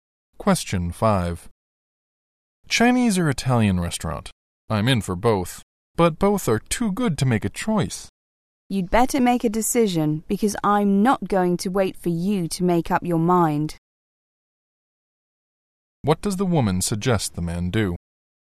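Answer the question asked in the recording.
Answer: Make a decision quickly.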